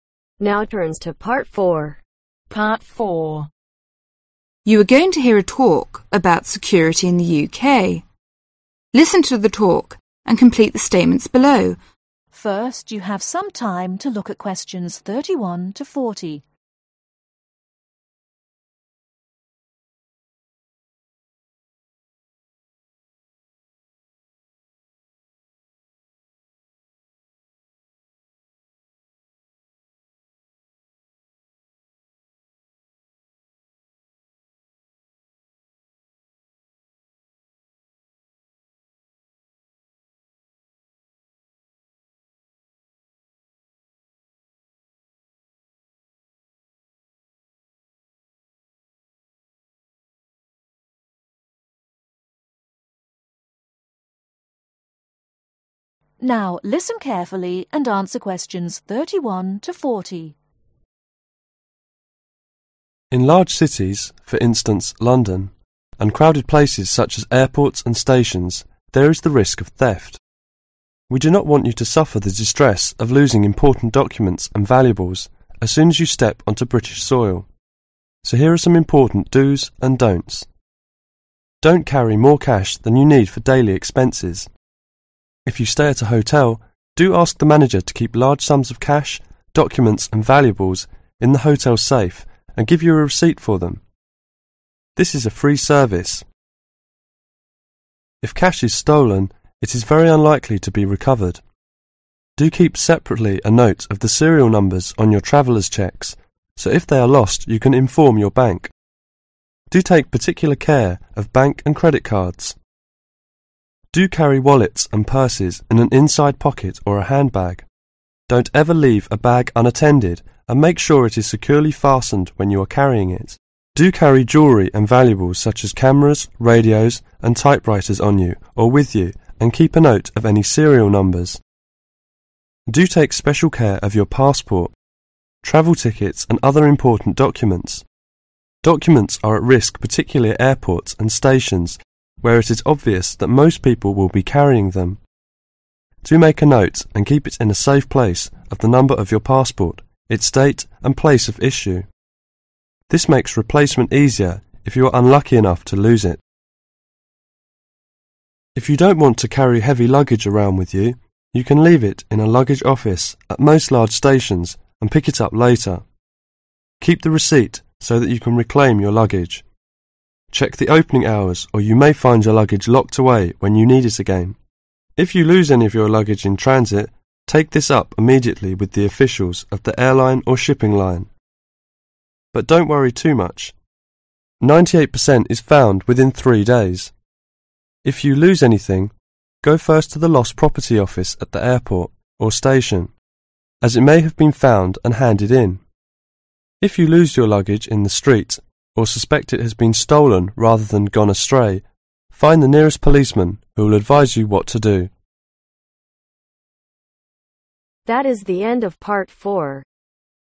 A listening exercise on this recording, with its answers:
Complete the notes below.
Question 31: Don't carry (31)............ cash than you need for daily expenses.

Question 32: When you stay at a hotel, ask the manager to keep your valuables in the hotel (32)............ .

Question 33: Don't keep a note of the (33)............ numbers together with your traveler's cheques.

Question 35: Your passport, travel tickets and other important documents should be taken (35)............ care of.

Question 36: You can leave your heavy luggage (36)............ at most large stations and pick it up later.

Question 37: It's necessary to keep the (37)............ and check the opening (38)............ when you leave your luggage at the station.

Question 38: It's necessary to keep the (37)............ and check the opening (38)............ when you leave your luggage at the station.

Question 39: The Lost Property Office can be found at both the (39)............ and the (40)............ .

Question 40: The Lost Property Office can be found at both the (39)............ and the (40)............ .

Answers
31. More
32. Safe
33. Serial
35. Special
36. Office
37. Receipt
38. Hours
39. Airport
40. Station